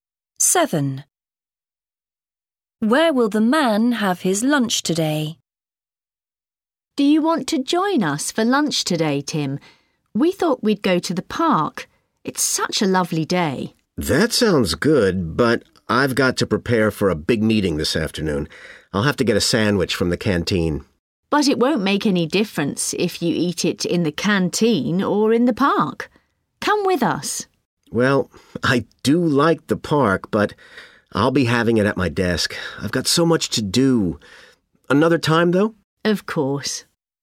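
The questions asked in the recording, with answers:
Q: Where will the man have his lunch today?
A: at his desk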